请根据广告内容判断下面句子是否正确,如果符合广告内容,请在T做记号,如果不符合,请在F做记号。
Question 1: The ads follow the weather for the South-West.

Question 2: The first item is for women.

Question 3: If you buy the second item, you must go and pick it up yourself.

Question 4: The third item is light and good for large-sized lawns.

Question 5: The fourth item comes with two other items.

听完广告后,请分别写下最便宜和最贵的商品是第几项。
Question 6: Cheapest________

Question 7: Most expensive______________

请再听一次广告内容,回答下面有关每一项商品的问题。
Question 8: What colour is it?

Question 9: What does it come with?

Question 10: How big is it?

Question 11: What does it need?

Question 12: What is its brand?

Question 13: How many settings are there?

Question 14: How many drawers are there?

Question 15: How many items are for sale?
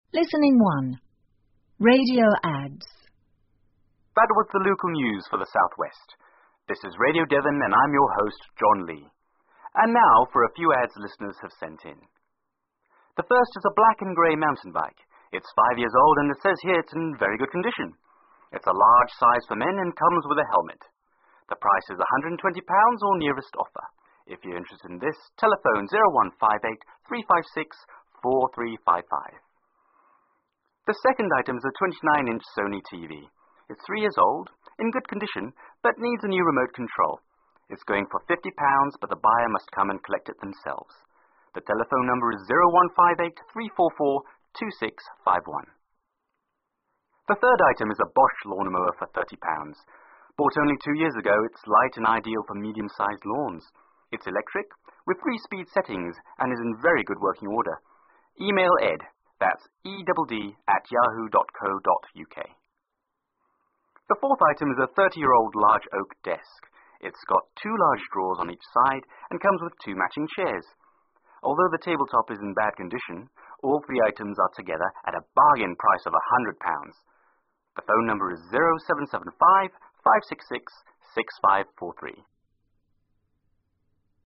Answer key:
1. F
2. F
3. T
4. F
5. T
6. 3
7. l
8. Black and grey
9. A helmet
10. 29 inches
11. A remote control
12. Bosh
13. Three
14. Four
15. Three

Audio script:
...that was the local news for the South-West. This is Radio Devon and I'm your host, John Lee. And now for a few ads listeners have sent in:
The first is a black and grey mountain bike. It's five years old and it says here, it's in very good condition. It's a large size for men and comes with a helmet. The price is £120 or nearest offer. If you're interested in this, telephone 0158-356-4355.
The second item is a 29-inch Sony TV. It's three years old, in good condition, but needs a new remote control. It's going for £50 but the buyers must come and collect it themselves. The telephone number is 0158-344-2651.
The third item is a Bosh lawn mower for £30.Bought only two years ago, it's light and ideal for medium-sized lawns. It's electric, with three speed settings and is in very good working order. Email Edd.
The fourth item is a 30-year-old large oak desk. It's got two large drawers on each side and comes with two matching chairs. Although the tabletop is in bad condition, all three items are together at a bargain price of £100.The telephone number is 0775-566-6543.